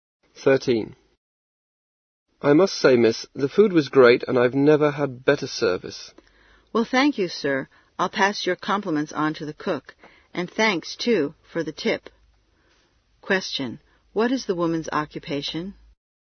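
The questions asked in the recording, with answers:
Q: What is the woman's occupation?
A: Waitress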